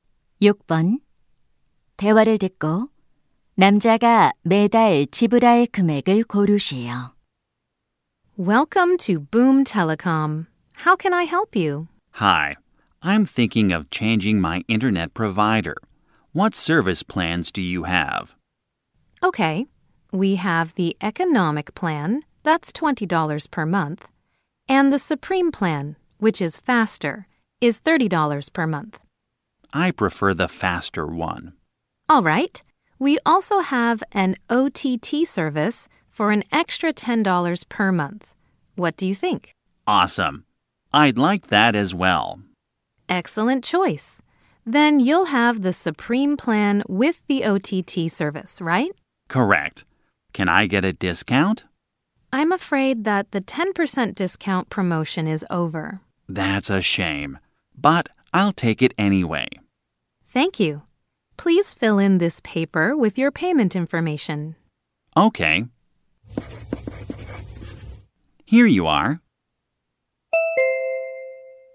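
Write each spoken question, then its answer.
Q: 대화를 듣고 남자가 매달 지불할 금액을 고르시오.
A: 40달러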